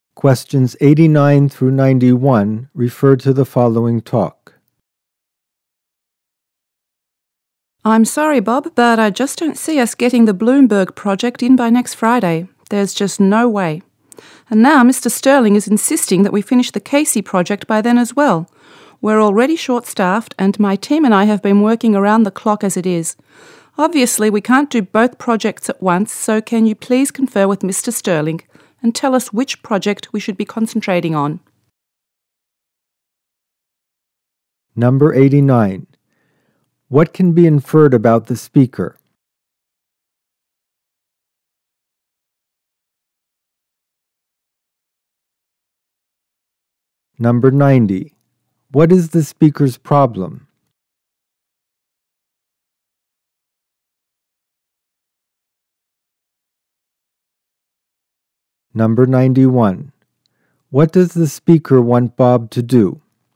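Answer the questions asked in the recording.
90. She can't finish both projects by next Friday; the team is short-staffed and overworked
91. Talk to Mr. Sterling and tell them which project to concentrate on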